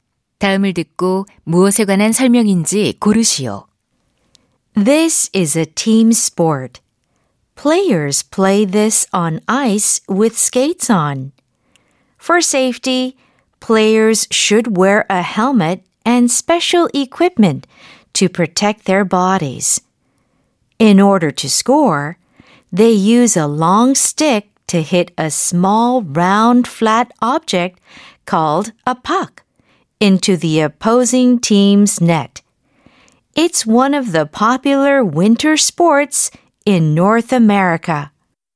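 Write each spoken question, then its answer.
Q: 다음을 듣고 무엇에 관한 설명인지 고르시오.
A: 아이스하키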